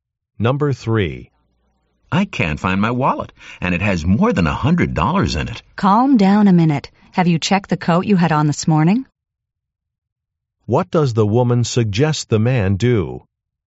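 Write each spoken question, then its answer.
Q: What does the woman suggest the man do?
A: Check the coat he wore this morning.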